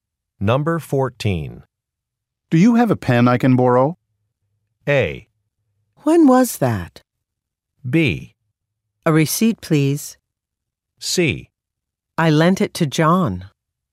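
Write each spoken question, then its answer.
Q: Do you have a pen I can borrow?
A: C: I lent it to John.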